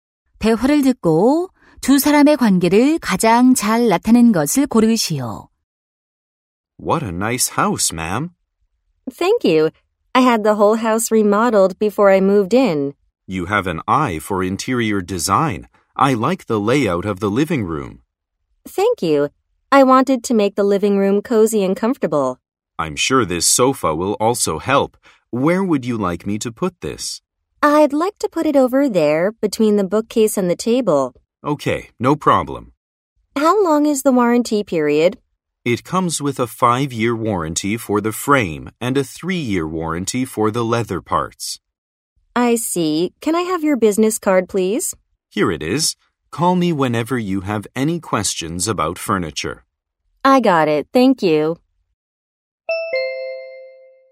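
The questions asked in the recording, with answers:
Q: 대화를 듣고 두 사람의 관계를 가장 잘 나타낸 것을 고르시오.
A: 고객 - 가구 배달원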